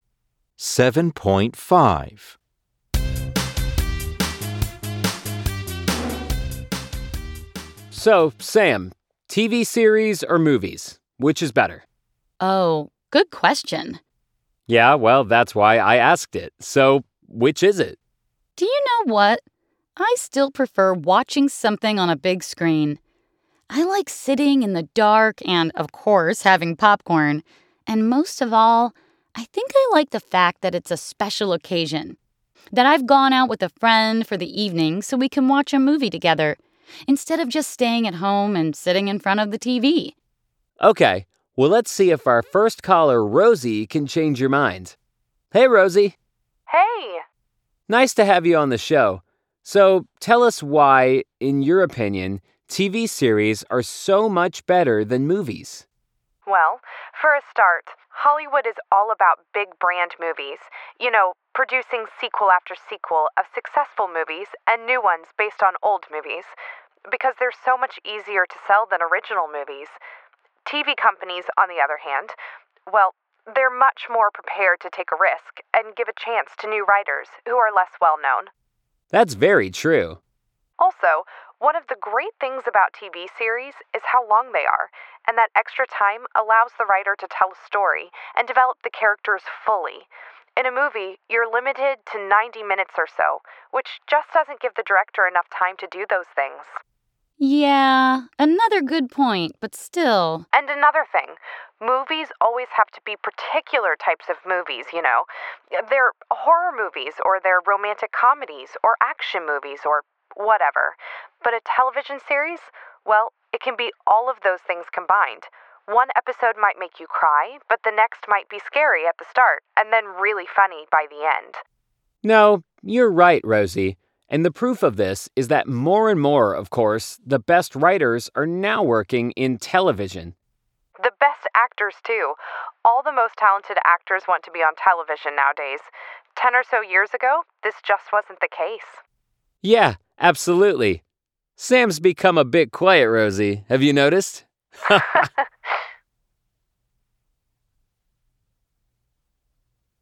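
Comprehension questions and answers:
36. Why does Sam prefer movies?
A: He likes the big screen, sitting in the dark with popcorn, and that it's a special occasion out with a friend.

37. According to Rosie, what is more likely to be original and unique?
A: TV series

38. What is the benefit of series being longer than movies?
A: The writer can tell a story and develop the characters fully.

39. Movies have to stick to one genre (e.g. horror)...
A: True

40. The best actors and writers have always been more interested in series.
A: False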